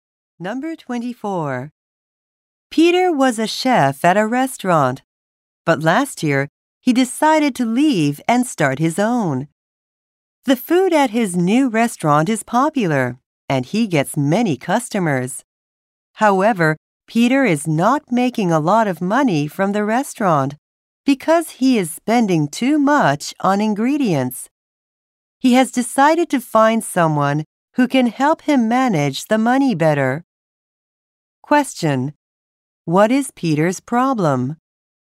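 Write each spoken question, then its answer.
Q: What is Peter's problem?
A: He spends too much on ingredients.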